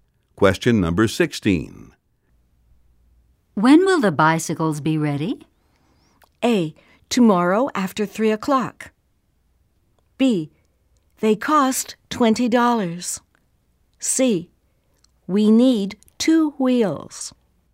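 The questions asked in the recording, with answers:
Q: When will the bicycles be ready?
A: A: Tomorrow after 3 o'clock.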